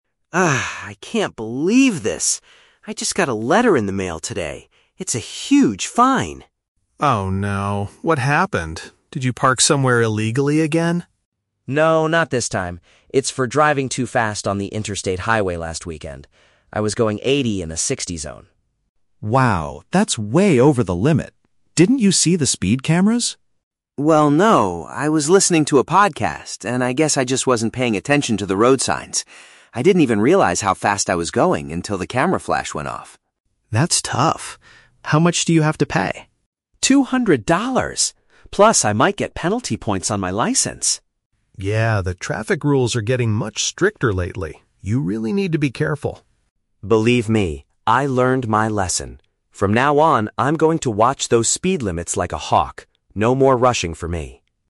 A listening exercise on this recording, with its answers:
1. Why did Alex receive a letter in the mail?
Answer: He drove his vehicle over the speed limit.

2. Why didn't Alex notice the speed camera?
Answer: He was distracted by an audio program.

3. What does Alex promise to do in the future?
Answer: Pay more attention to the traffic warnings.

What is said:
Alex: Ugh, I can't believe this. I just got a letter in the mail today. It's a huge fine!
Ben: Oh no! What happened? Did you park somewhere illegally again?
Alex: No, not this time. It's for driving too fast on the interstate highway last weekend. I was going 80 in a 60 zone.
Ben: Wow, that's way over the limit. Didn't you see the speed cameras?
Alex: Well, no. I was listening to a podcast and I guess I just wasn't paying attention to the road signs. I didn't even realize how fast I was going until the camera flash went off.
Ben: That's tough. How much do you have to pay?
Alex: Two hundred dollars! Plus, I might get penalty points on my license.
Ben: Yeah, the traffic rules are getting much stricter lately. You really need to be careful.
Alex: Believe me, I learned my lesson.